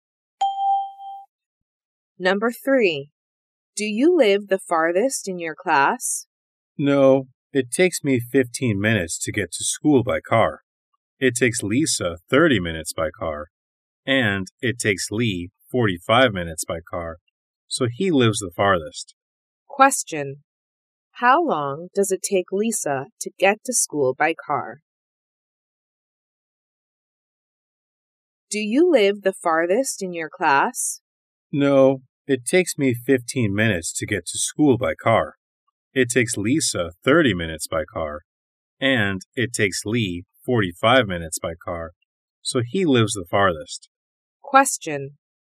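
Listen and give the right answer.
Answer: 30 minutes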